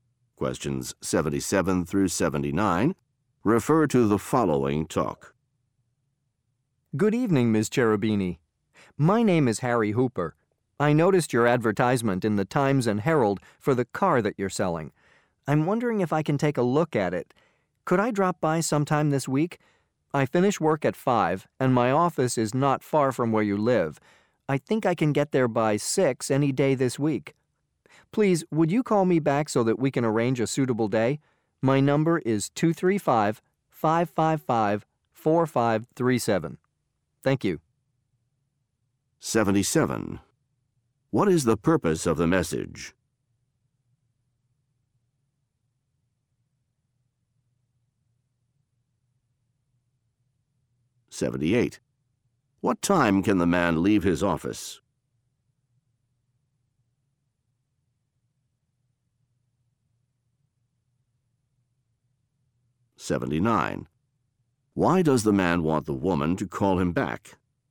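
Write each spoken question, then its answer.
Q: What is the purpose of the message?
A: To ask to see a car for sale

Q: What time can the man leave his office?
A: At 5

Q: Why does the man want the woman to call him back?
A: To arrange a suitable day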